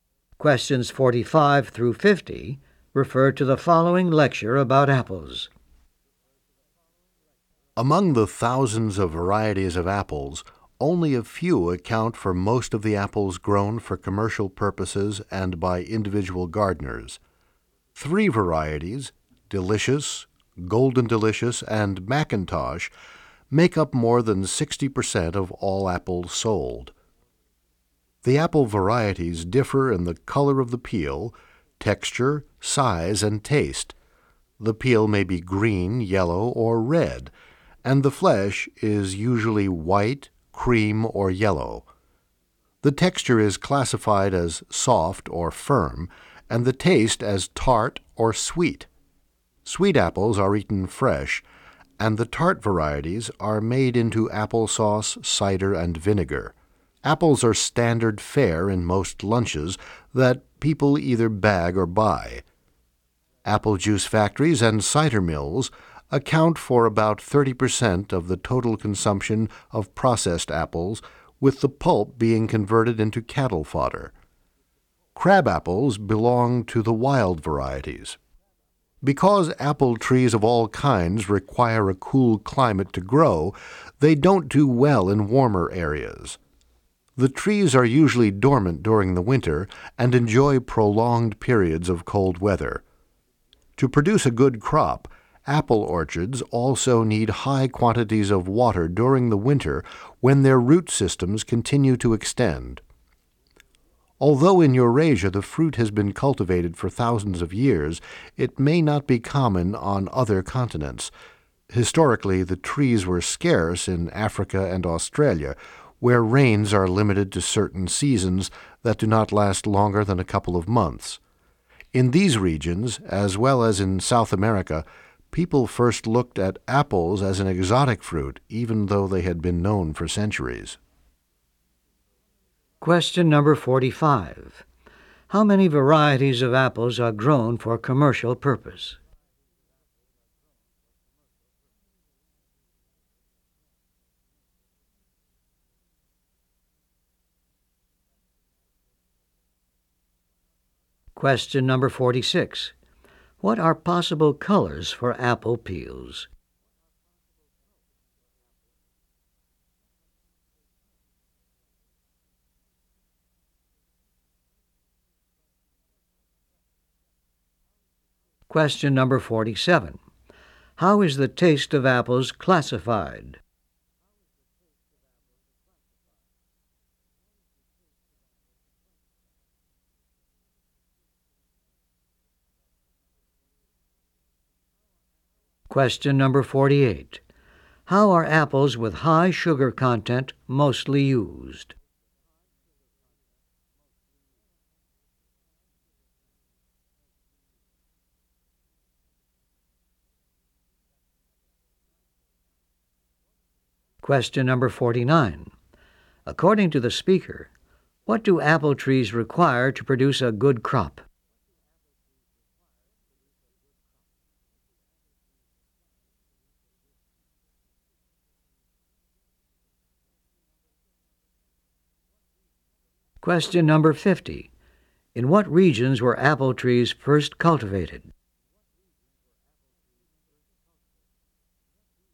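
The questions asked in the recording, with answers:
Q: What are possible colors for apple peels?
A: Green, yellow, or red

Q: How is the taste of apples classified?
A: As tart or sweet

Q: How are apples with high sugar content mostly used?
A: They are eaten fresh

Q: According to the speaker, what do apple trees require to produce a good crop?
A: Lots of water in winter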